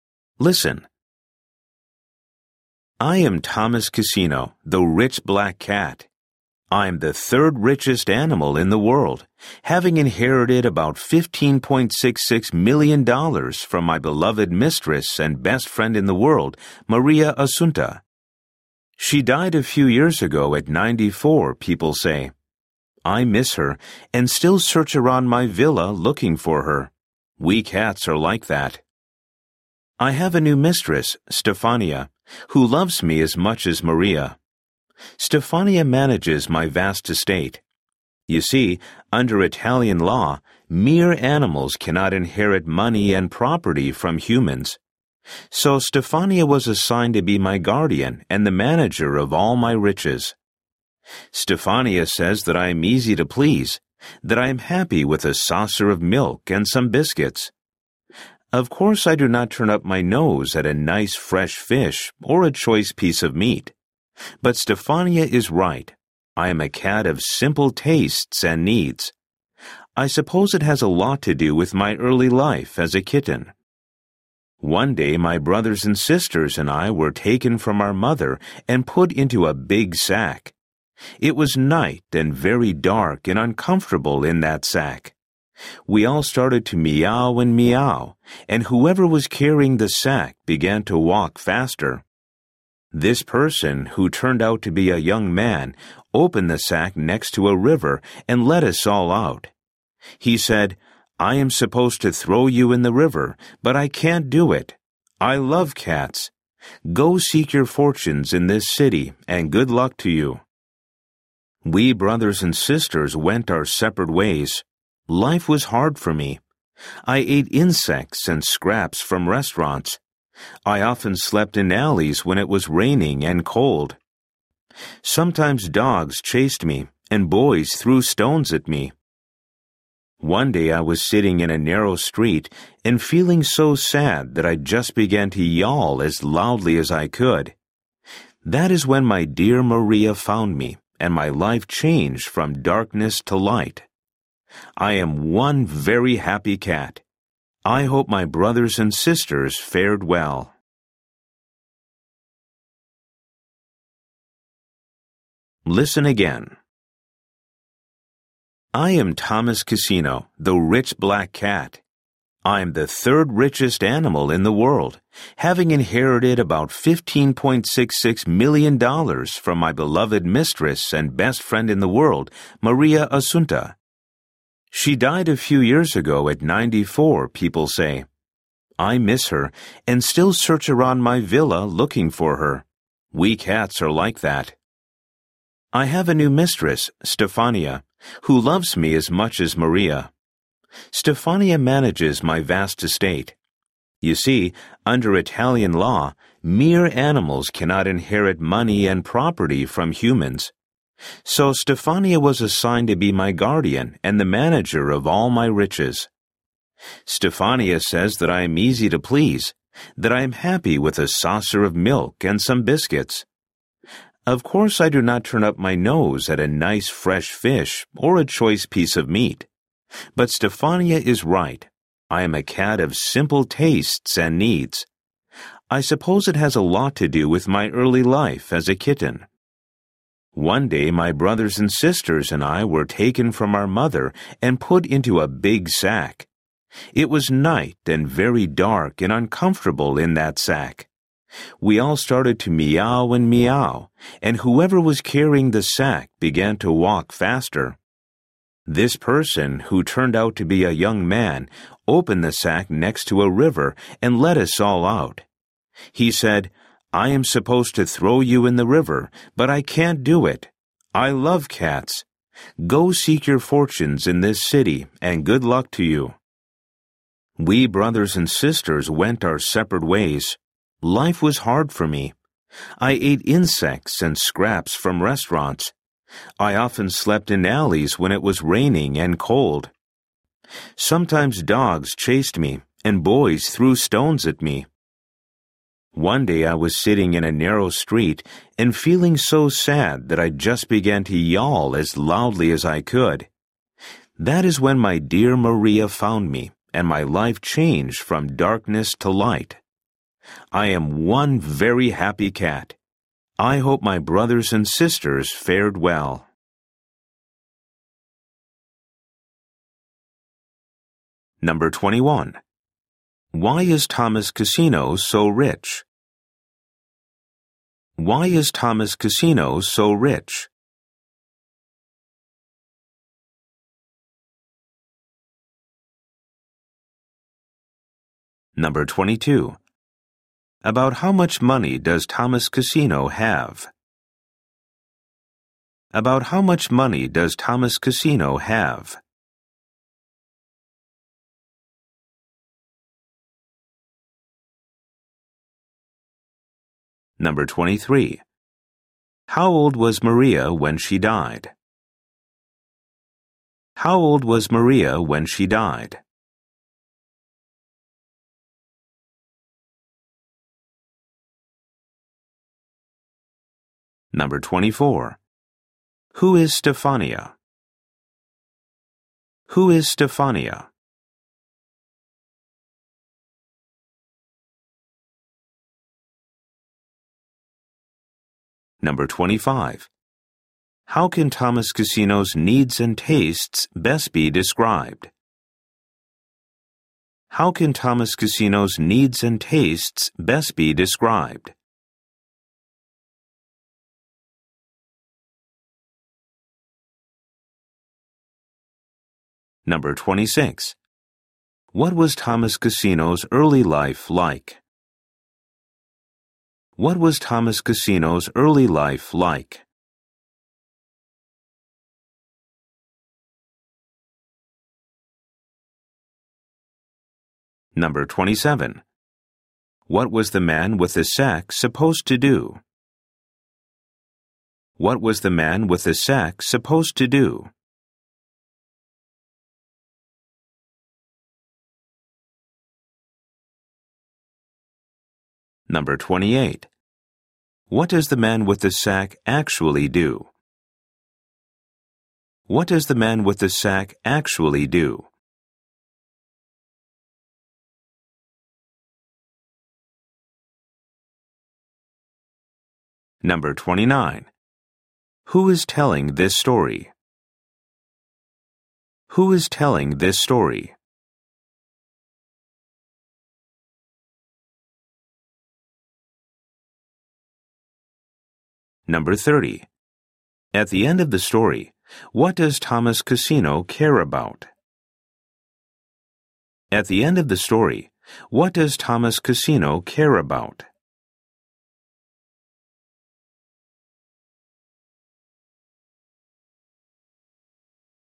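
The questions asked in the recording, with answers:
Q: Why is Thomas Casino so rich?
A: He inherited money from his mistress, Maria Assunta

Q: About how much money does Thomas Casino have?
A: About $15.66 million

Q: How old was Maria when she died?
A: 94

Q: Who is Stefania?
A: His new mistress, guardian and the manager of his estate

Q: How can Thomas Casino's needs and tastes best be described?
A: Simple

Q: What was Thomas Casino's early life like?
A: Hard

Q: What was the man with the sack supposed to do?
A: Throw the kittens in the river

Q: What does the man with the sack actually do?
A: He let the kittens out next to the river

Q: Who is telling this story?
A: Thomas Cassino, the cat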